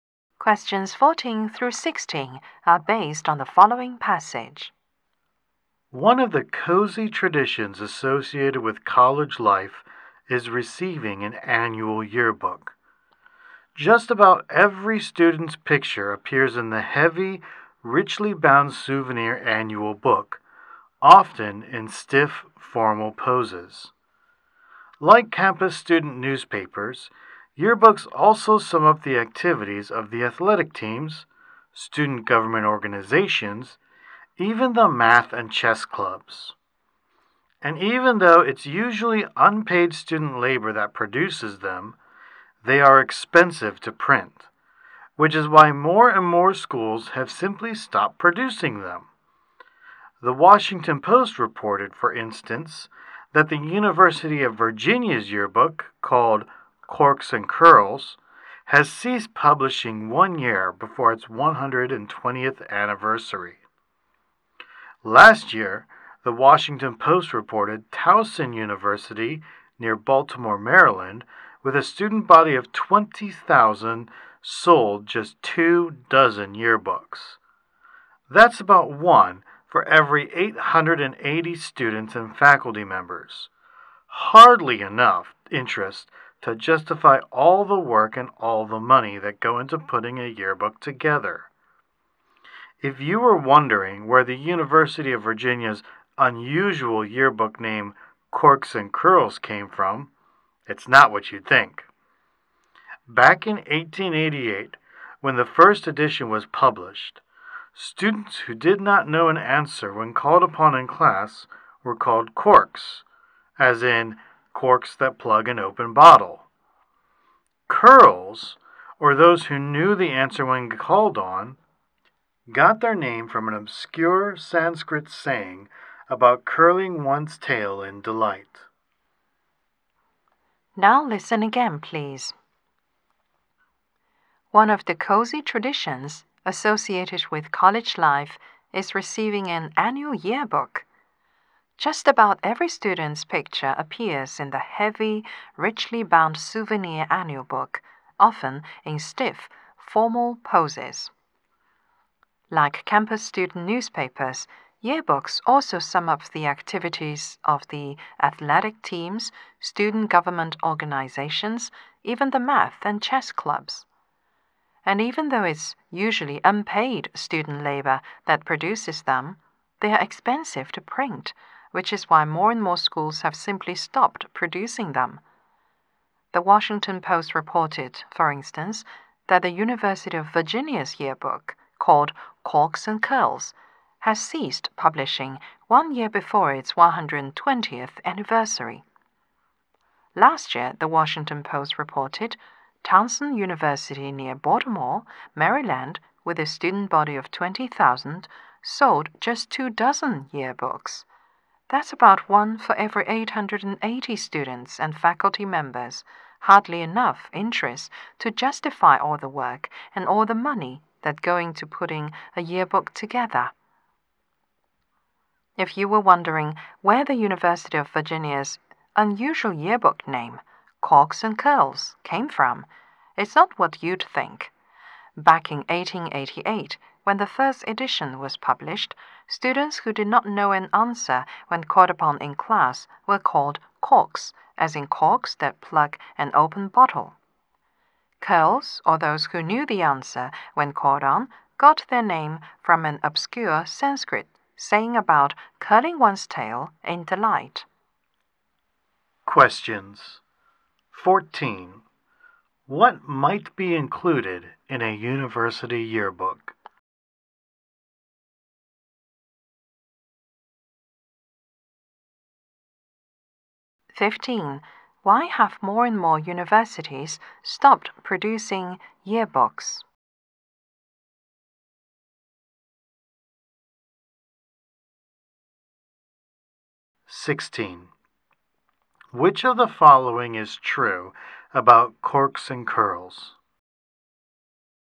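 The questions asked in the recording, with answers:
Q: What might be included in a university yearbook?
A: Students' pictures and club and team activities

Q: Why have more and more universities stopped producing yearbooks?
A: They are expensive to print and there is little interest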